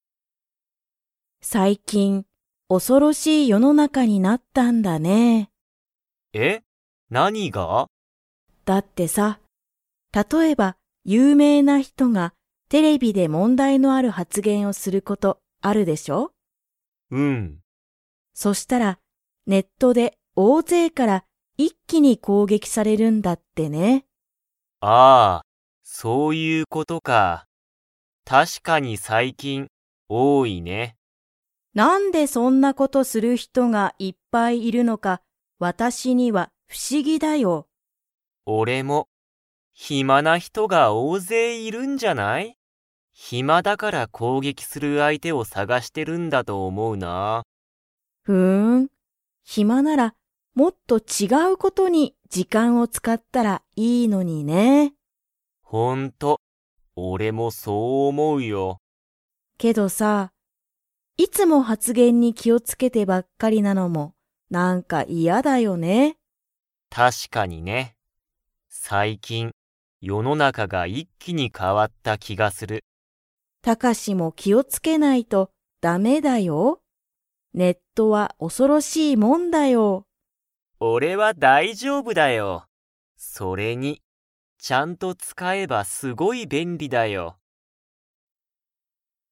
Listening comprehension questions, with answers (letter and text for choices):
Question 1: 有名ゆうめいな人ひとが、ネットで大勢おおぜいから攻撃こうげきされることは 。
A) 多おおい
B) 少すくない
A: A) 多おおい

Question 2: タカシは、ネットをどんなものだと思おもっていますか?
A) 恐おそろしいもの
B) おかしいもの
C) 便利べんりなもの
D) 有名ゆうめいなもの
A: C) 便利べんりなもの